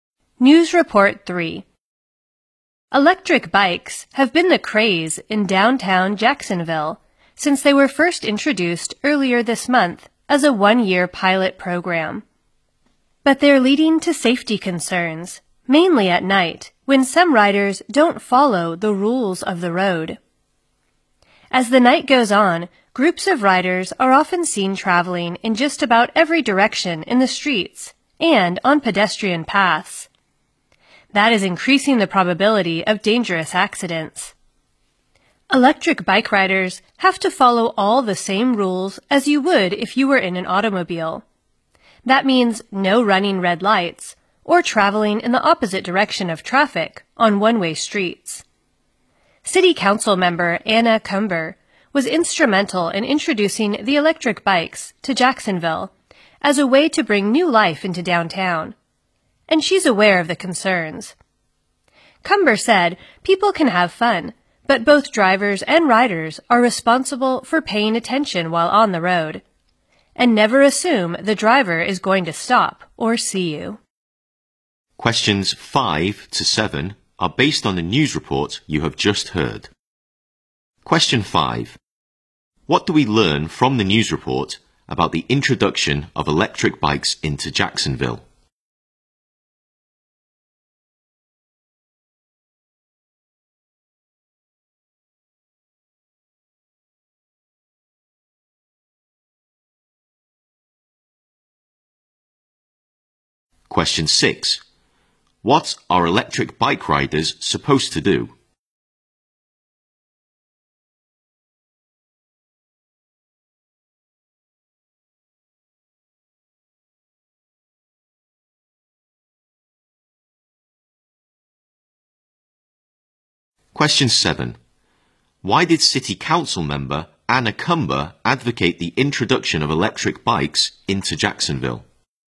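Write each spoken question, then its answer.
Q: What are electric bike riders supposed to do?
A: Follow the same rules of the road as car drivers

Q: Why did City Council member Anna Cumber advocate the introduction of electric bikes into Jacksonville?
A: To bring new life into downtown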